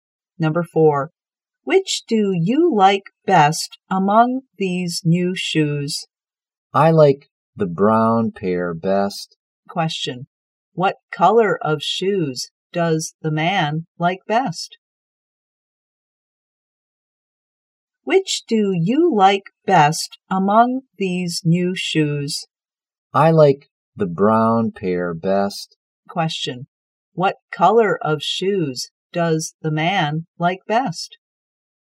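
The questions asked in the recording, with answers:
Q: What color of shoes does the man like best?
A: Brown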